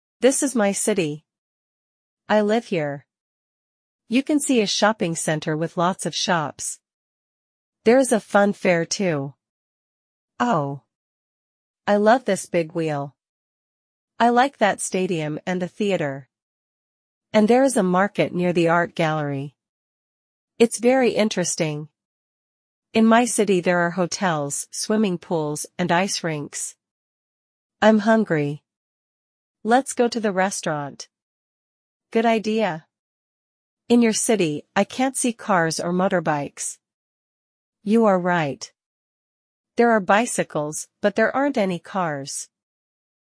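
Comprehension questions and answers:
Listen and choose the correct option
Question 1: There is a swimming pool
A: True

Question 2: There are cars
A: False

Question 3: There are bicycles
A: True

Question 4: There are motorbikes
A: False

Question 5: There is an art gallery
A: True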